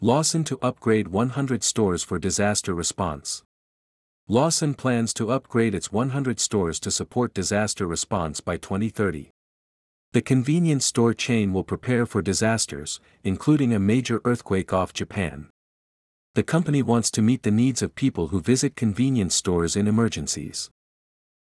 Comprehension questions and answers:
次の各英文の内容が本文の説明と合っていたら"True"、違っていたら"False" を選んでください。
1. Lawson plans to upgrade its 100 stores within two years.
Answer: False

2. The company wants to help people who come to convenience stores in emergencies.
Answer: True

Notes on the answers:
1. 1番目のセンテンスで、「ローソンは2030年までに100店舗を改修し、災害対応を支援する計画である。」と述べています。「2年以内に改修が終わる」という意味ではないため、設問1の解答はFalse となります。
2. 3番目のセンテンスで、「同社は、災害時にコンビニを訪れる人々のニーズに応えたいとしている。」と述べています。設問と内容が合っているため、設問2の解答はTrue となります。

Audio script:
Lawson to upgrade 100 stores for disaster response
Lawson plans to upgrade its 100 stores to support disaster response by 2030.
The convenience store chain will prepare for disasters, including a major earthquake off Japan.
The company wants to meet the needs of people who visit convenience stores in emergencies.

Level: 中級脱出